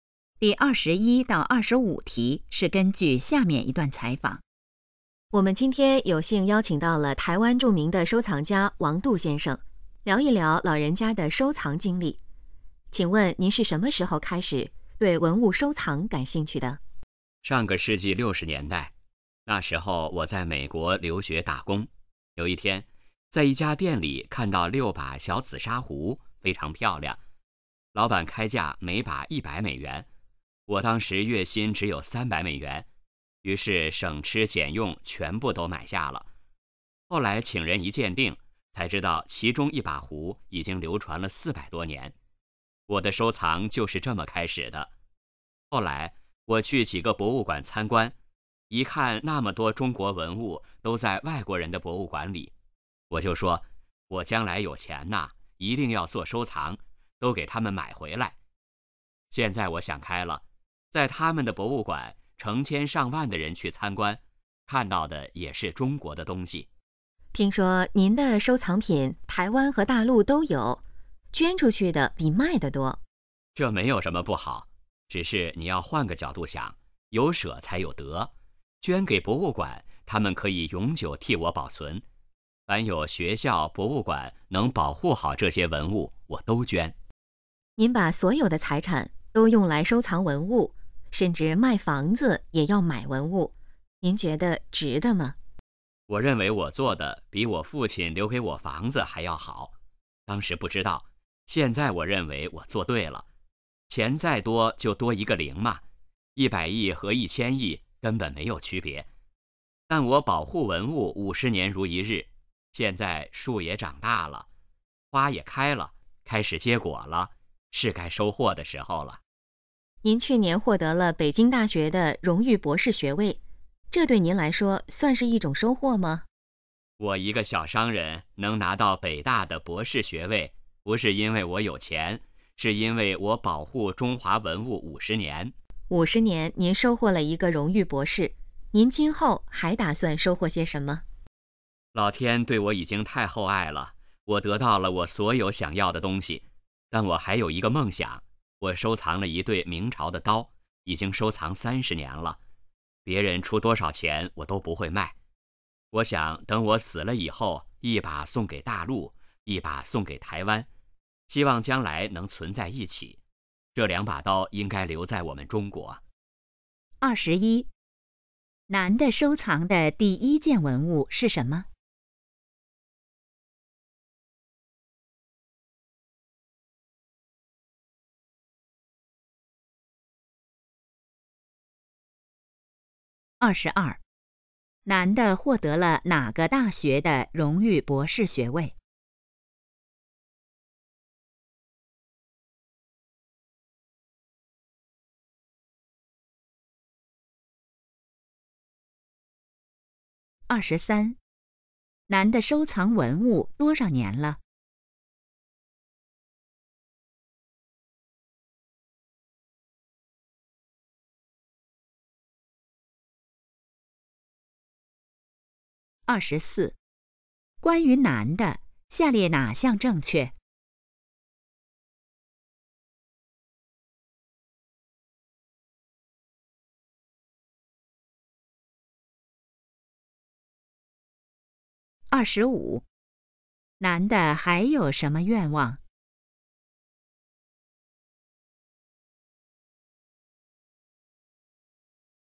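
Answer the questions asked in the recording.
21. 小紫砂壶
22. 北京大学
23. 50年
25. 把一对明朝的刀一把送大陆、一把送台湾,将来能存在一起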